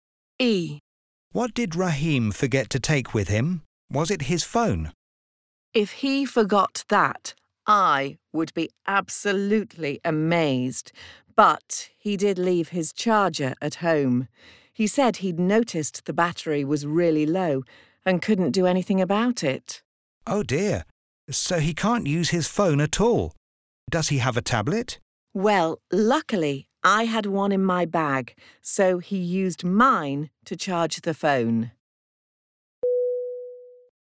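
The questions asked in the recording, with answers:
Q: What did Rahim forget to take with him?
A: His phone charger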